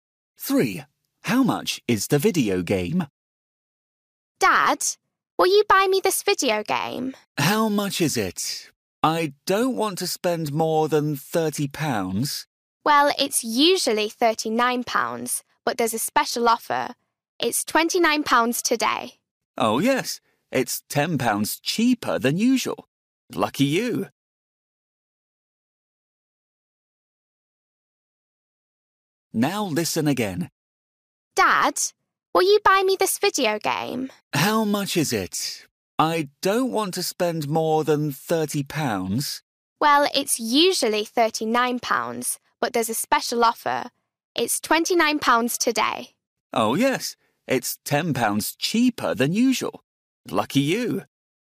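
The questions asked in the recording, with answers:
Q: How much is the video game?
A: £29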